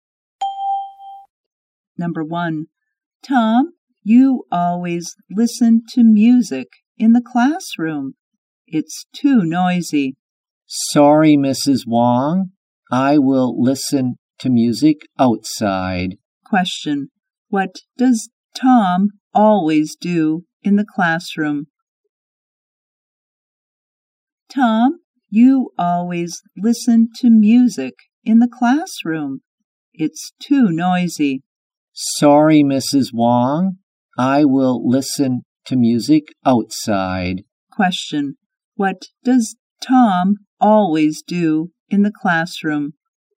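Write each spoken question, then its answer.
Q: What does Tom always do in the classroom?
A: He listens to music.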